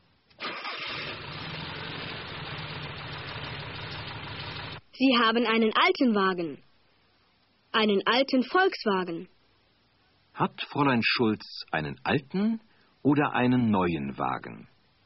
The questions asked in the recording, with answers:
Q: Hat Fräulein Schulz einen alten oder einen neuen Wagen?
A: Sie hat einen alten Wagen.